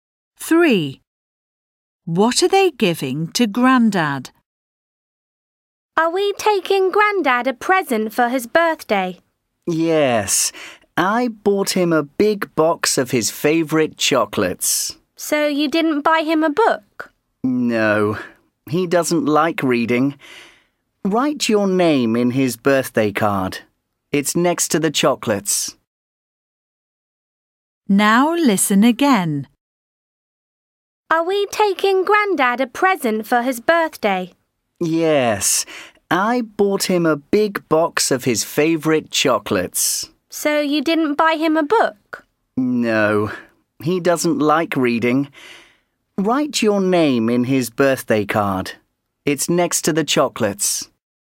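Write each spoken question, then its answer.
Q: What are they giving to Grandad?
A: A big box of chocolates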